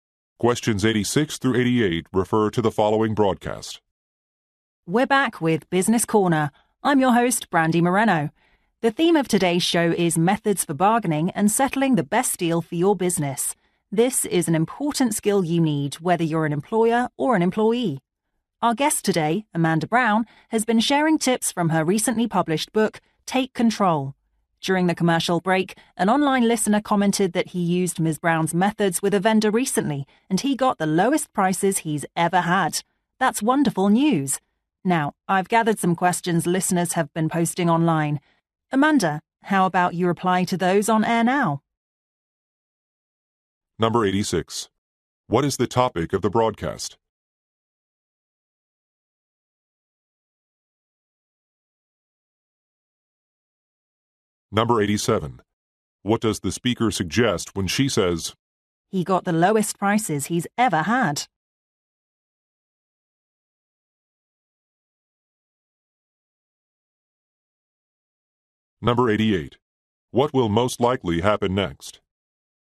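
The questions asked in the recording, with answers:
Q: What is the topic of the broadcast?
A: Negotiation methods for business

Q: What does the speaker suggest when she says, "He got the lowest prices he's ever had"?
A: Ms. Brown's methods are effective

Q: What will most likely happen next?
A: The guest will answer listeners' questions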